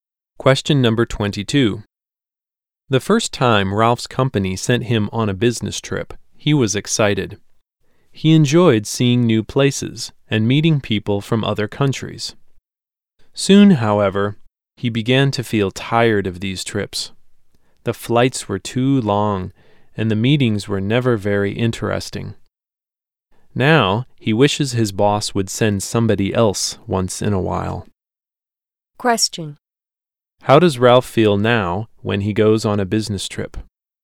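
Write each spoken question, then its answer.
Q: How does Ralph feel now when he goes on a business trip?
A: Tired of them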